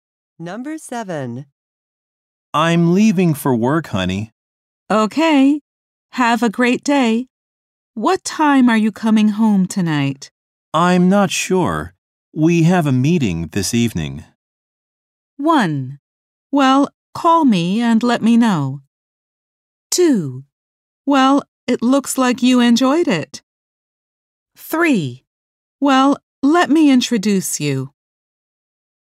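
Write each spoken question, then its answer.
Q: I'm not sure. We have a meeting this evening.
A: 1: Well, call me and let me know.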